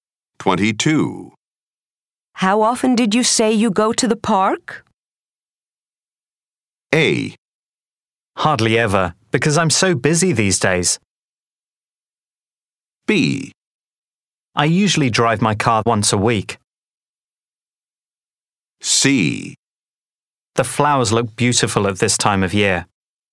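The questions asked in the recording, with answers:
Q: How often did you say you go to the park?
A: A: Hardly ever, because I'm so busy these days.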